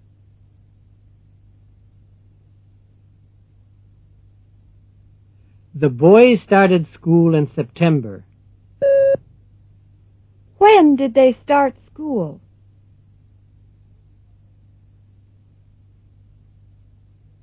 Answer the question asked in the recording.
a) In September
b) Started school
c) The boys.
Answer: a) In September

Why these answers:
The boys started school in September. When did they start school?

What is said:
3.The boys started school in September. When did they start school? (a)